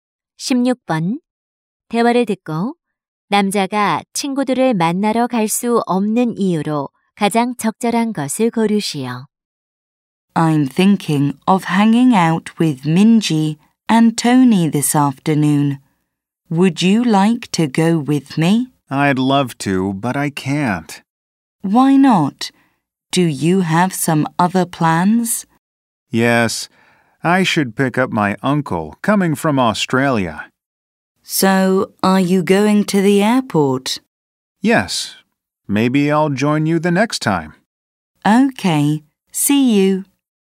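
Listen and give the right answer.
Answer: 호주에서 오는 삼촌을 공항에 마중 나가야 해서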